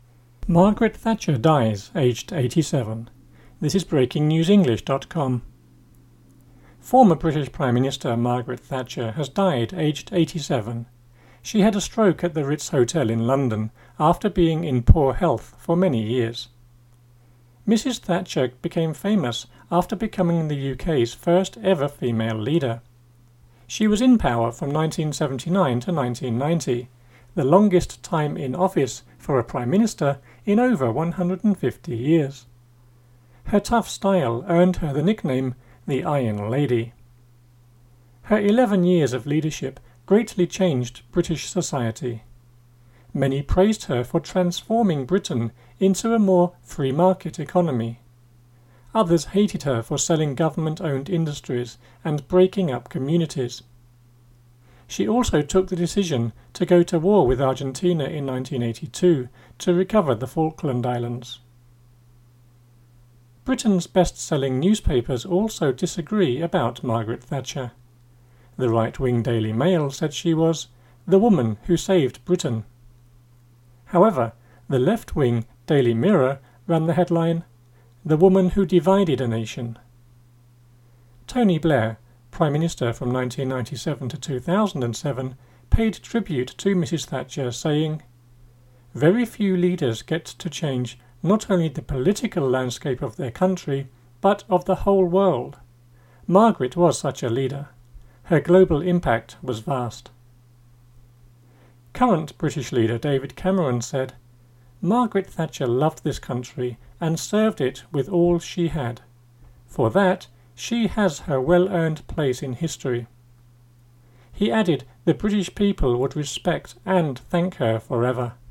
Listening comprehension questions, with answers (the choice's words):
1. What did Margaret Thatcher die of / from?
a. cancer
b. a heart attack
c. old age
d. a stroke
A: a stroke

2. Where did she die?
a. at home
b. in a hotel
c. in a car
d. in a store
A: in a hotel

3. For how long was she British Prime Minister?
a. 9 years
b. 10 years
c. 11 years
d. 12 years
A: 11 years

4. What was her nickname?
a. the "Iron Lady"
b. the "Golden Girl"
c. "Superwoman"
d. the "Woman of Steel"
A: the "Iron Lady"

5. What do some people say she broke up?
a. towns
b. economies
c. communities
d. politics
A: communities

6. What left wing newspaper was mentioned in the article?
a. The Daily Mail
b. The Daily Mirror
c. The Daily Star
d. The Daily Sun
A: The Daily Mirror

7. Who was in office in Britain between 1997-2007?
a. Winston Churchill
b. Margaret Thatcher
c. David Cameron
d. Tony Blair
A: Tony Blair

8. How many leaders get to change the political landscape?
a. very few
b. 3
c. many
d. they all do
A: very few

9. What did David Cameron say Margaret Thatcher loved?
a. leadership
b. her party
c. the U.K. / G.B.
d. serving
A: the U.K. / G.B.

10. For how long did Cameron say people would be grateful to Mrs Thatcher?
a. 11 years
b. forever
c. a few weeks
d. until her funeral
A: forever